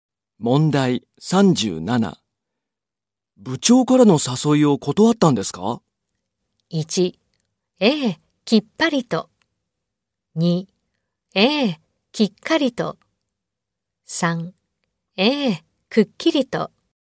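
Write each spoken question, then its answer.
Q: 部長からの誘いを断ったんですか?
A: 1: ええ、きっぱりと。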